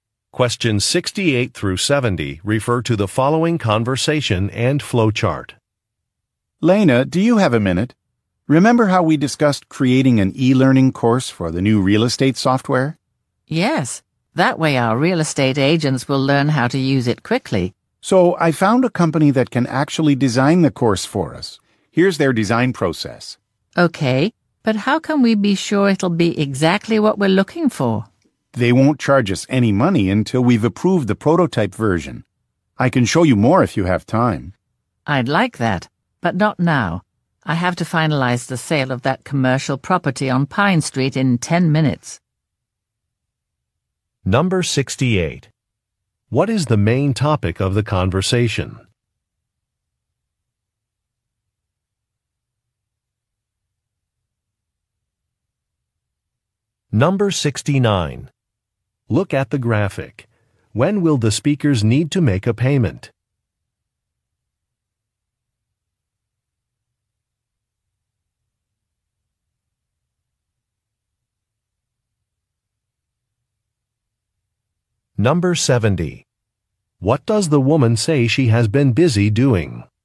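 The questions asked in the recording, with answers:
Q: What is the main topic of the conversation?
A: An e-learning course for the new real estate software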